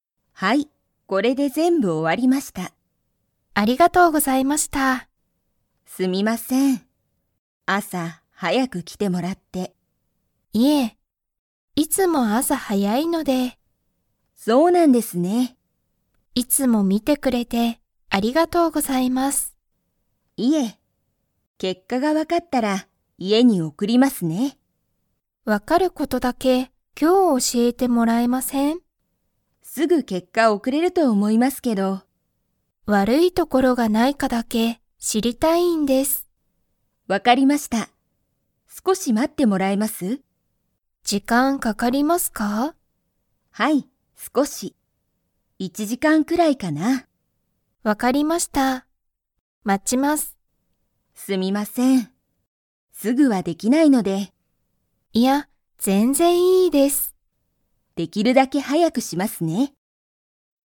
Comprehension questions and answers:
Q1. ____が分(わ)かったら、家(いえ)に送(おく)る。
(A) 結果(けっか)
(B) 病院びょういんの場所ばしょ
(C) 時間(じかん)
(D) いい所(ところ)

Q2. 佐藤(さとう)さんは、1(いち)時間(じかん)くらい待(ま)ちますか?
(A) はい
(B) いいえ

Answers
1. (A) 結果(けっか)
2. (A) はい

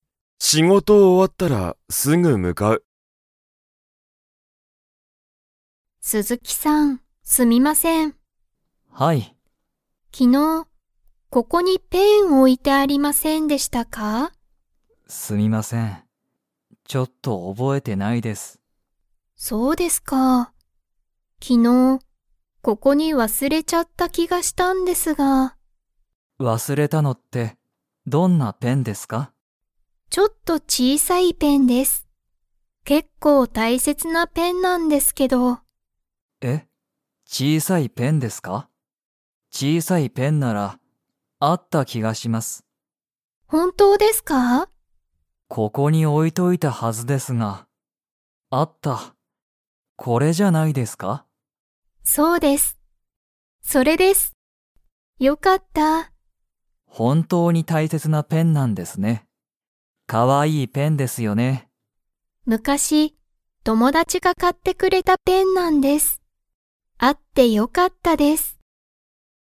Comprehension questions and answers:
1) そのペンは____。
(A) 結構大切けっこうたいせつだ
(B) 全然ぜんぜん小ちいさくない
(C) すごい可愛かわいい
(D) とても高たかかった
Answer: (A) 結構大切けっこうたいせつだ

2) 山田やまださんは、そのペンを自分じぶんで買かいましたか?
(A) はい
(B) いいえ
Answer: (B) いいえ

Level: Level 2

